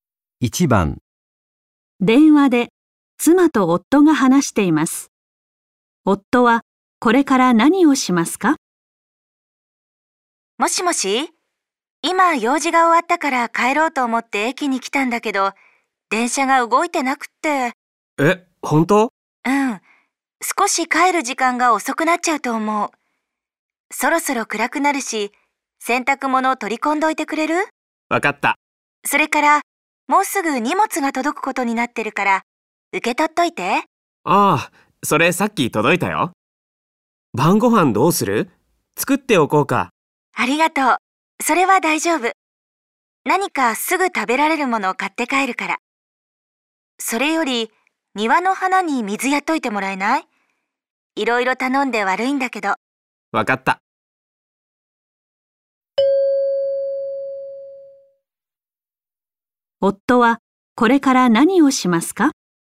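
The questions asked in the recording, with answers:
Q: 夫はこれから何をしますか?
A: すぐ食べられるものを買って帰る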